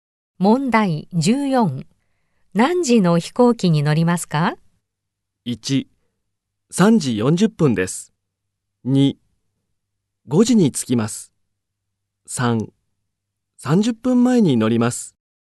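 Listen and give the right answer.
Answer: 1: 3時40分です。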